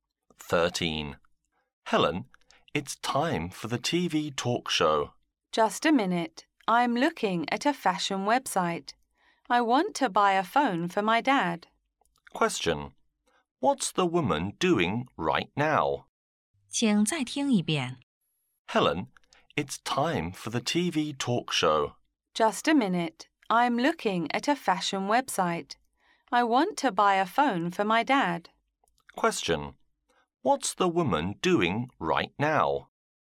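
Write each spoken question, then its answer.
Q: What's the woman doing right now?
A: Looking at a fashion website to buy a phone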